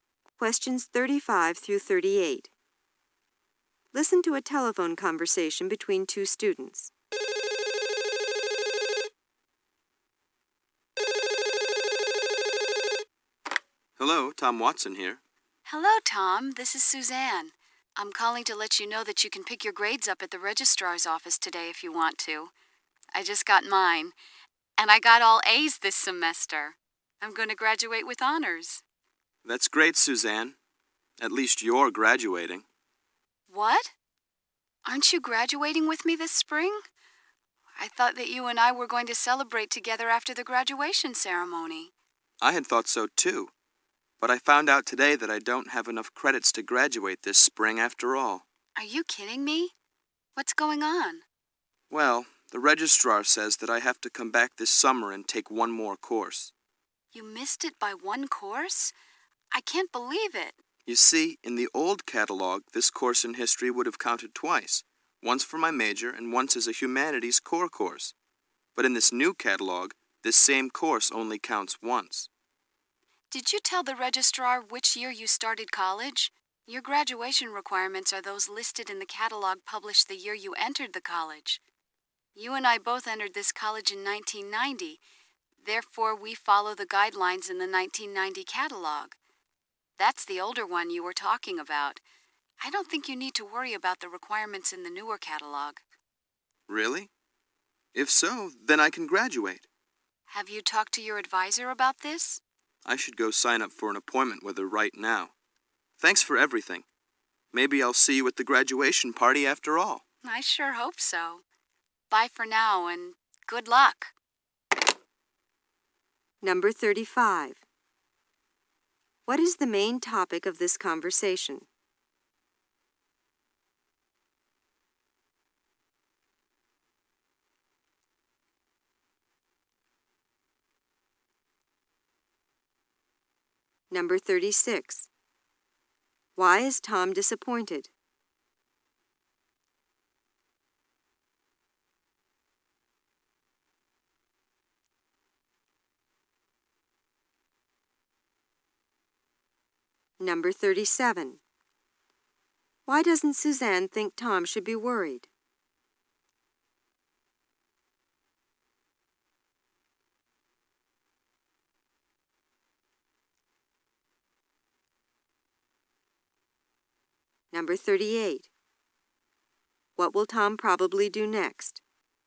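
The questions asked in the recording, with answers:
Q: What is the main topic of this conversation?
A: Tom's graduation requirements

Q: Why is Tom disappointed?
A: He thinks he doesn't have enough credits to graduate this spring

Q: Why doesn't Suzanne think Tom should be worried?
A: He follows the 1990 catalog, the one from the year he entered, where the course counts twice

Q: What will Tom probably do next?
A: Sign up for an appointment with his advisor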